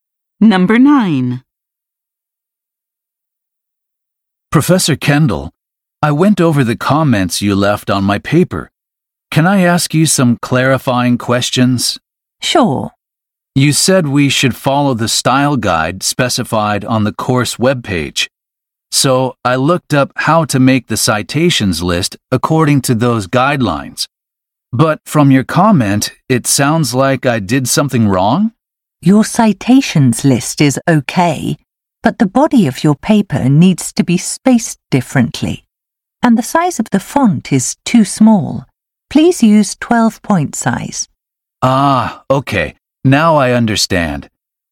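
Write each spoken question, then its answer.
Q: What problem did the professor find with the man's paper?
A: The spacing of the body was wrong and the font was too small.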